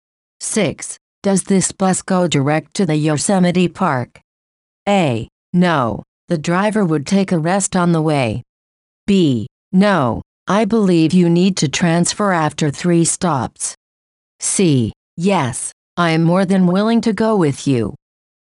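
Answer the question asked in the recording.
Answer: B: No, I believe you need to transfer after 3 stops.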